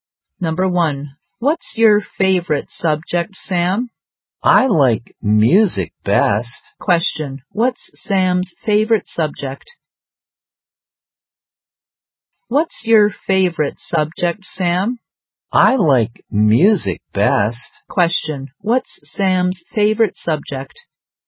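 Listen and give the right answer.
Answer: Music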